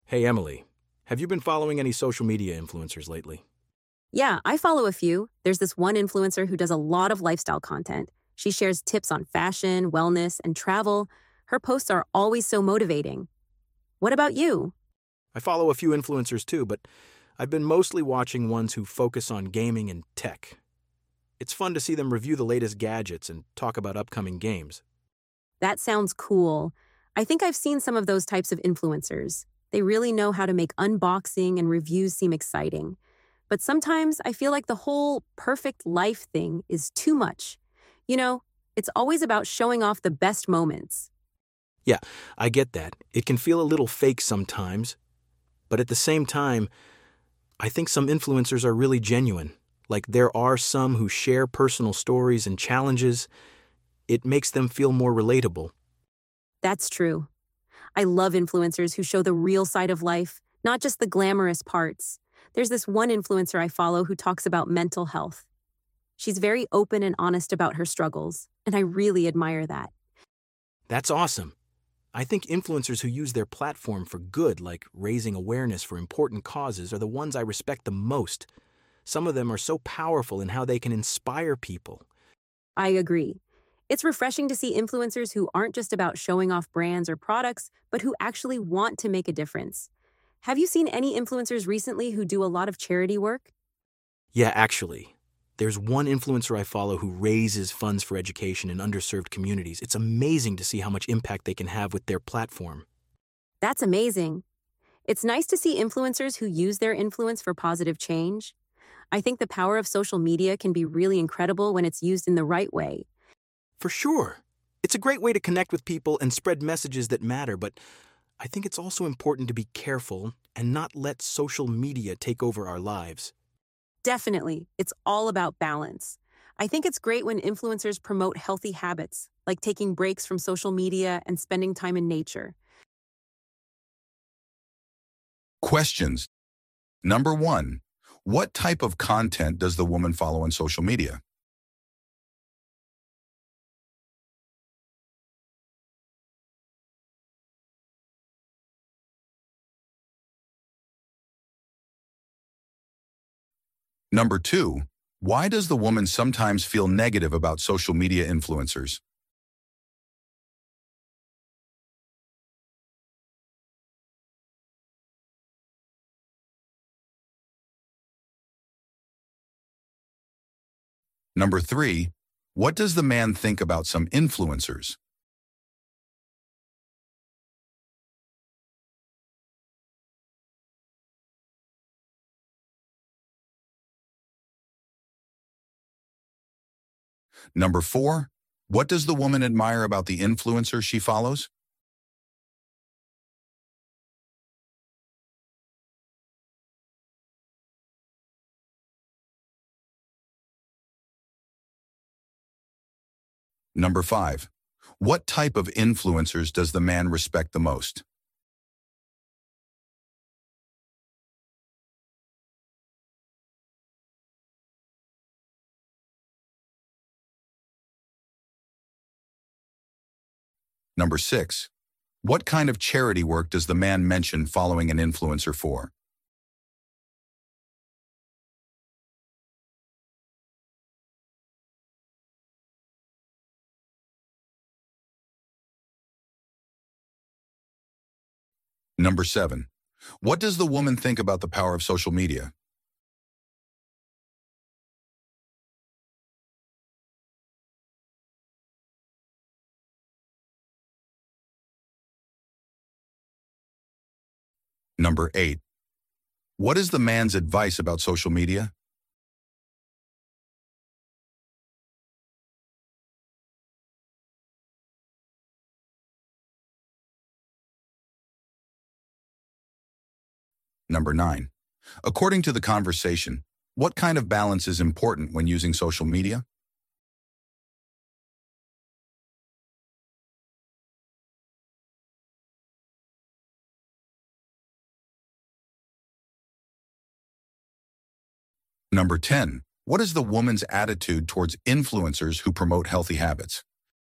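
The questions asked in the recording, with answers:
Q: what type of content does the woman follow on social media?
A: Lifestyle content: fashion, wellness and travel tips

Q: why does the woman sometimes feel negative about social media influencers?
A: The "perfect life" image is too much; they only show their best moments

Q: what does the man think about some influencers?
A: Some are really genuine and share personal stories and challenges

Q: what does the woman admire about the influencer she follows?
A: She is open and honest about her mental health struggles

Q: what type of influencers does the man respect the most?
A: Those who use their platform for good, like raising awareness for important causes

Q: what kind of charity work does the man mention following an influencer for?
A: Raising funds for education in underserved communities

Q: what does the woman think about the power of social media?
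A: It can be incredible when used in the right way

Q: what is the man's advice about social media?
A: Be careful and don't let social media take over your life

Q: what is the woman's attitude towards influencers who promote healthy habits?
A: Positive; she thinks it's great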